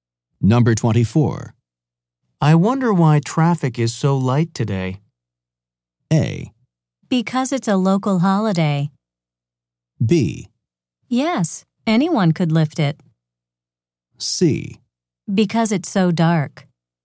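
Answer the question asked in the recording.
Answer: A: Because it's a local holiday.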